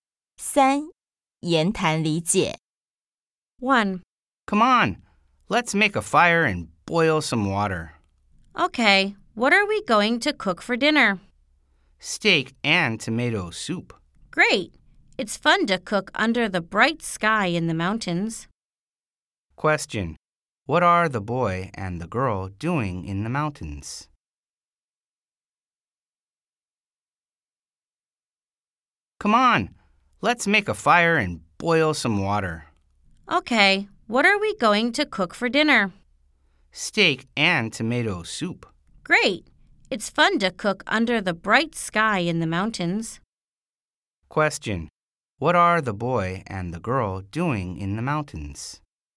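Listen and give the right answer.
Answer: camping and cooking dinner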